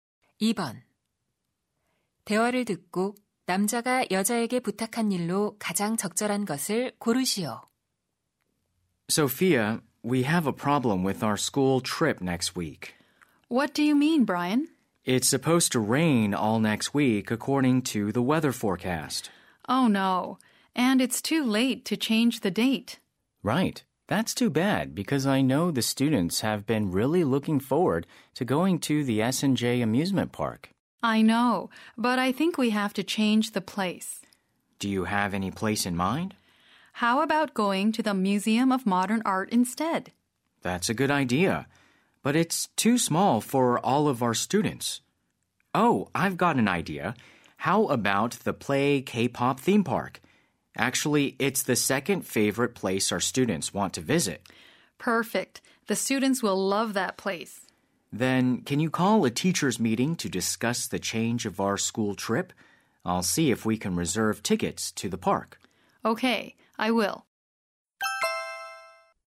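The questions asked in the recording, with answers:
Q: 대화를 듣고 남자가 여자에게 부탁한 일로 가장 적절한 것을 고르시오.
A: 교사 회의 소집하기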